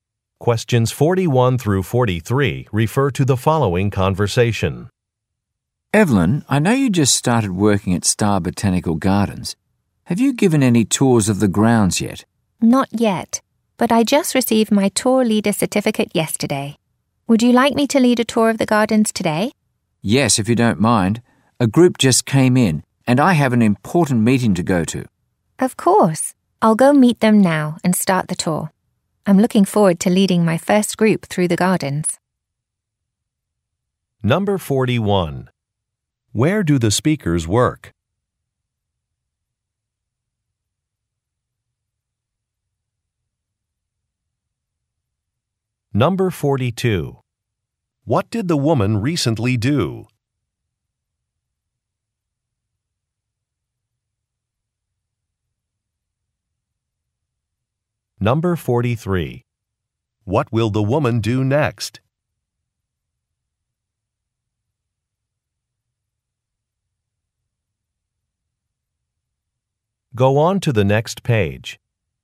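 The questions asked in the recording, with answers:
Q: Where do the speakers work?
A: At a botanical garden

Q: What did the woman recently do?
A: Received a tour leader certificate

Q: What will the woman do next?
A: Lead a tour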